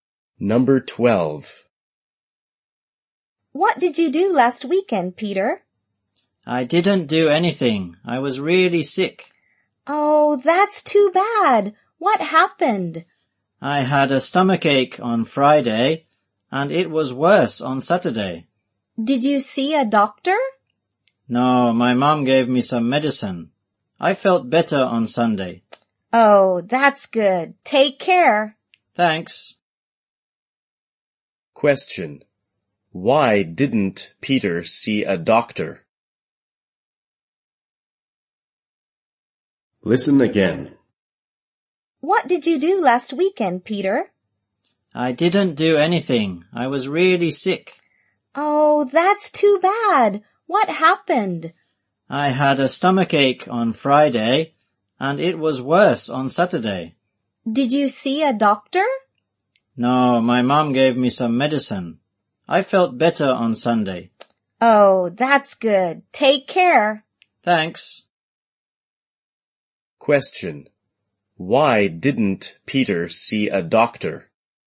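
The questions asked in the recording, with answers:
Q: Why didn't Peter see a doctor?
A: His mom gave him some medicine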